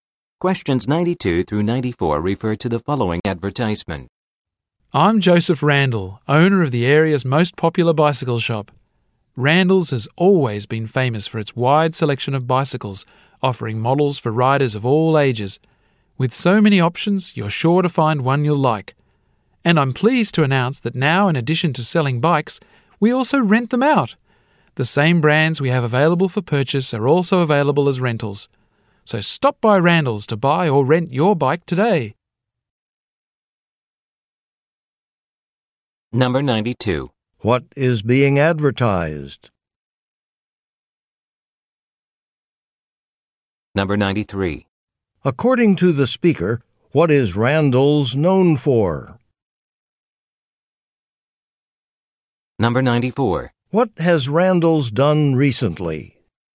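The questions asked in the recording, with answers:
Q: What is being advertised?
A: A bicycle shop

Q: According to the speaker, what is Randall's known for?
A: Its wide selection of bicycles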